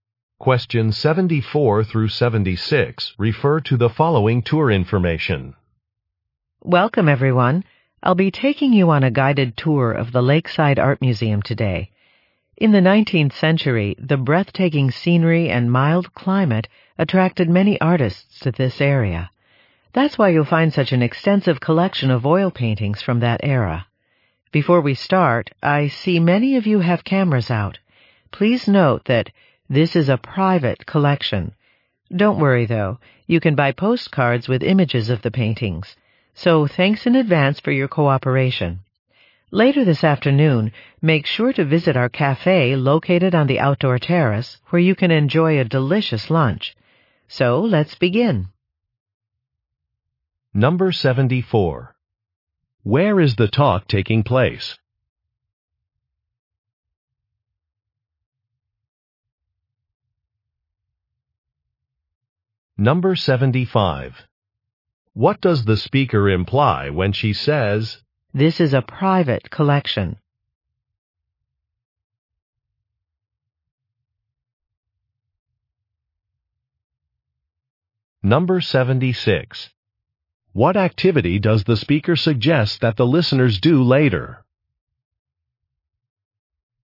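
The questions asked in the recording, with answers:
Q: Where is the talk taking place?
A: At an art museum

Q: What does the speaker imply when she says, "This is a private collection"?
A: Taking photographs is not allowed

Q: What activity does the speaker suggest that the listeners do later?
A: Visit the cafe on the outdoor terrace for lunch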